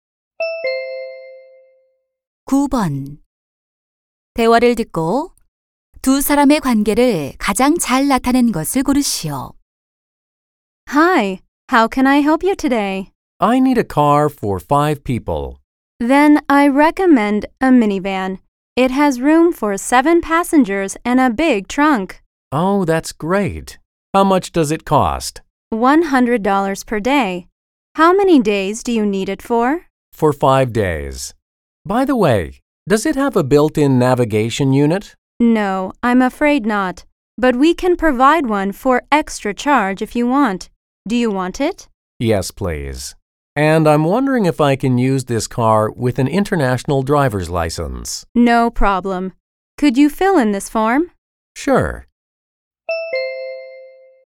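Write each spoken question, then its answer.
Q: 대화를 듣고 두 사람의 관계를 가장 잘 나타낸 것을 고르시오.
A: 렌터카 직원 - 고객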